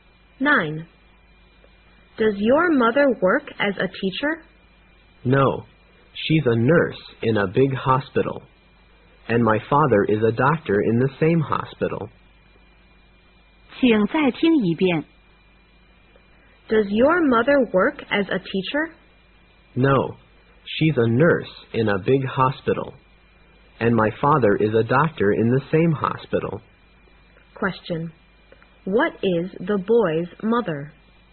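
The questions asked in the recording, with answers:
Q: What is the boy's mother?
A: A nurse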